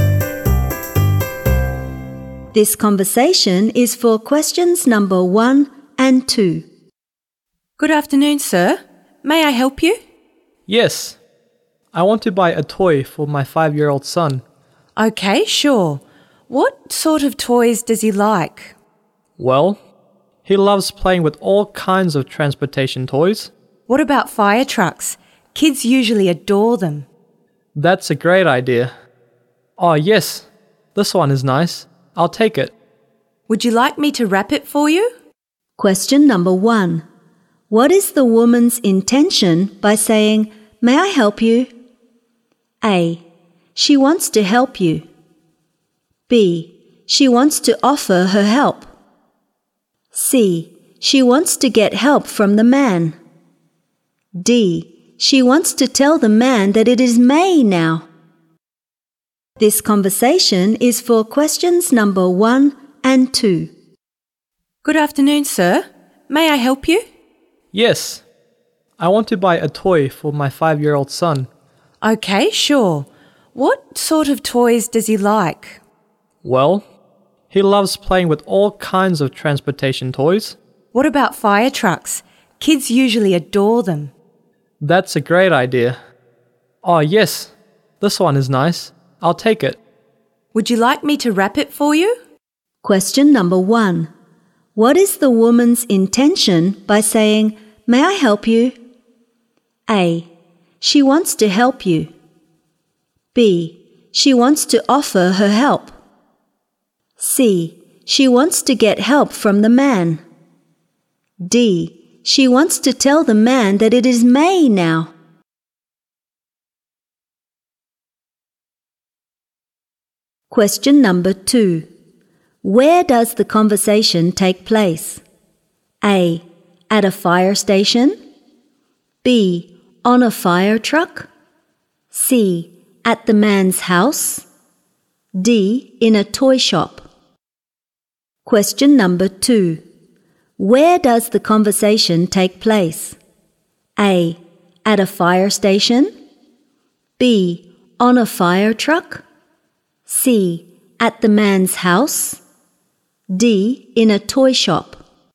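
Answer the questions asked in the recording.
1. B: She wants to offer her help.
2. D: In a toy shop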